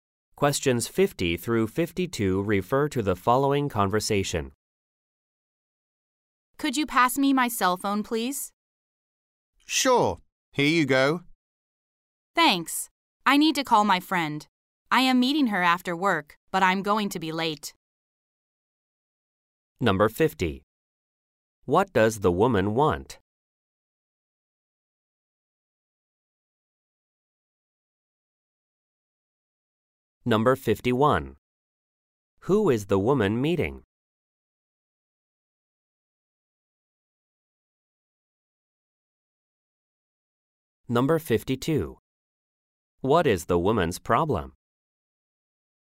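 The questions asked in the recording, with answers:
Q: What does the woman want?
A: Her cell phone

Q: Who is the woman meeting?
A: Her friend

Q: What is the woman's problem?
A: She is going to be late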